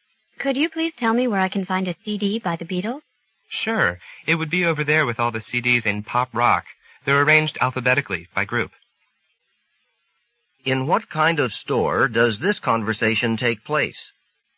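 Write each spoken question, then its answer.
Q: In what kind of store does this conversation take place?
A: A music store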